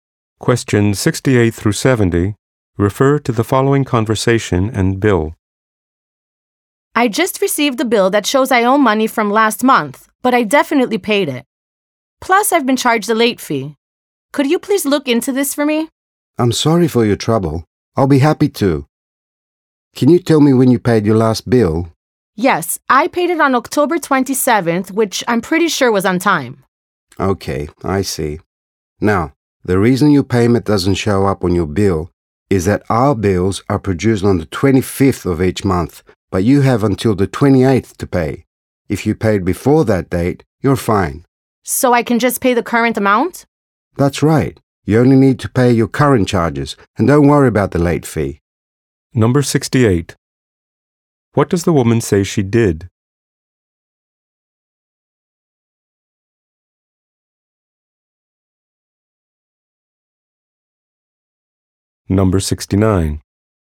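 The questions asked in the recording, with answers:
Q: What does the woman say she did?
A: She paid last month's bill on October 27th

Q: What does the man want to know?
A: When she paid her last bill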